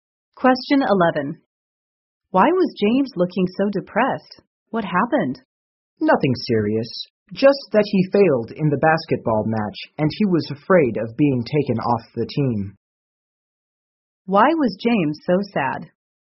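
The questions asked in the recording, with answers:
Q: Why was James so sad?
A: He lost the basketball match and was afraid of being taken off the team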